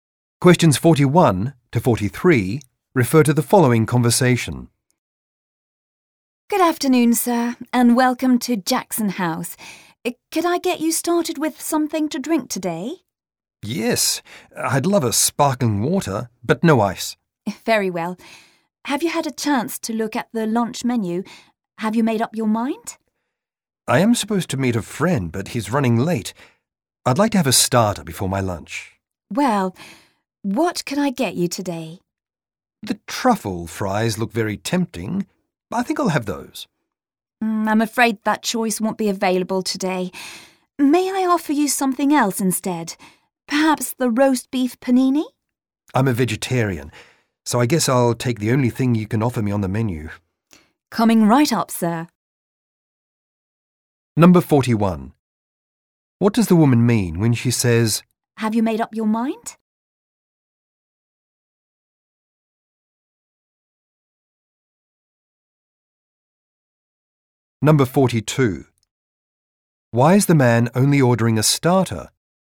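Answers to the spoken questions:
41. She is asking if he is ready to order
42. He is waiting for a friend who is running late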